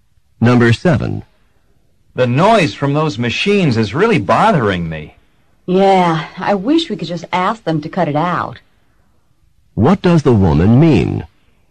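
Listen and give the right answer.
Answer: She wishes they could ask them to stop the noise.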